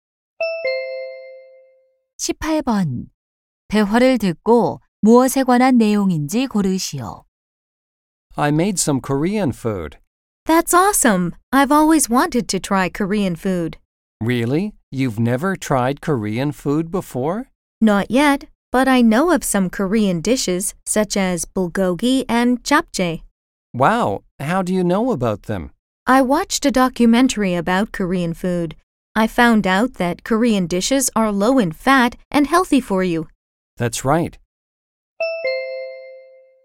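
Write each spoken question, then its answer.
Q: 대화를 듣고 무엇에 관한 내용인지 고르시오.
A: 한국 음식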